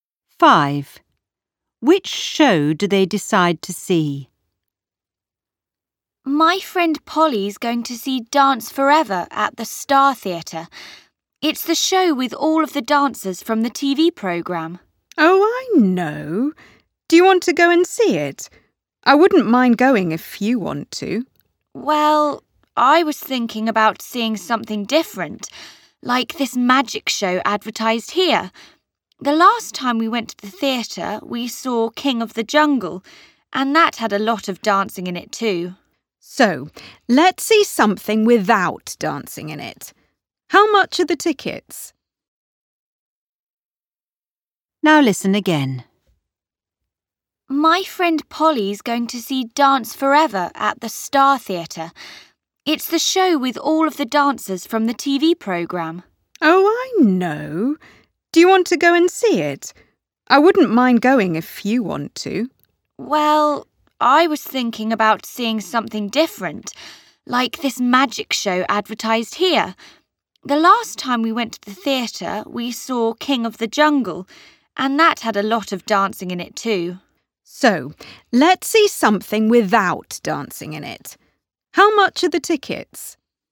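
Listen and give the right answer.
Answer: The magic show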